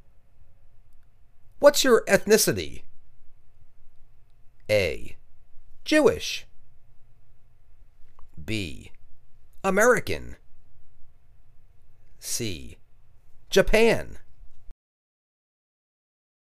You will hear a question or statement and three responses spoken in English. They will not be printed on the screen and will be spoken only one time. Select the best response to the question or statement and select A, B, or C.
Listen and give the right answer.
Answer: Jewish